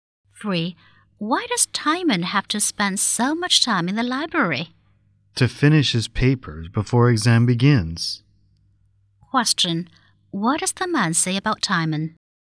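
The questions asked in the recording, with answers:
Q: What does the man say about Timon?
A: He has to finish his papers before the exams begin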